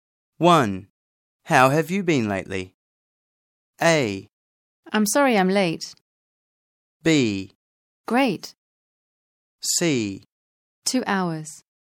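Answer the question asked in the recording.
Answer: B: Great.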